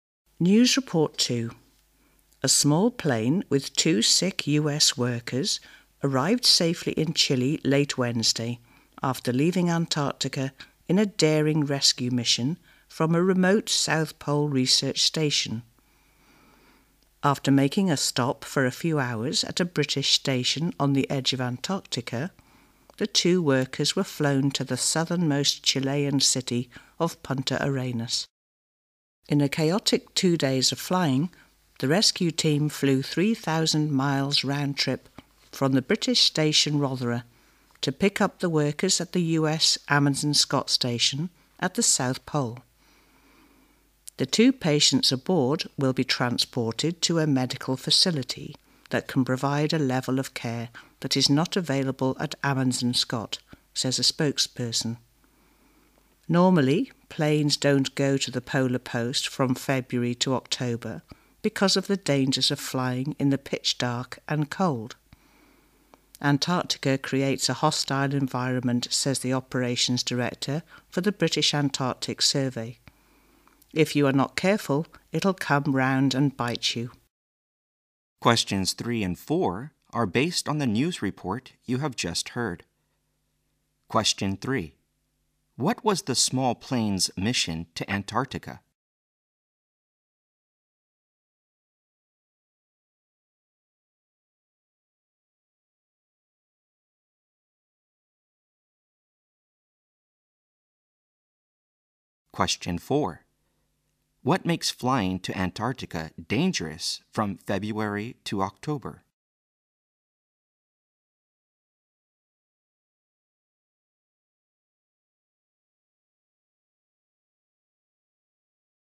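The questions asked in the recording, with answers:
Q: What was the small plane's mission to Antarctica?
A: To rescue two sick US workers from the South Pole research station

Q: What makes flying to Antarctica dangerous from February to October?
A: The pitch dark and the cold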